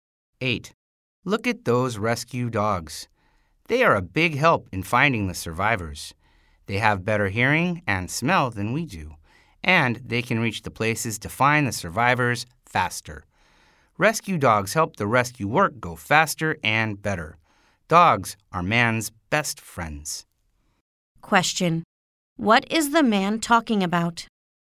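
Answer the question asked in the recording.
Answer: Rescue dogs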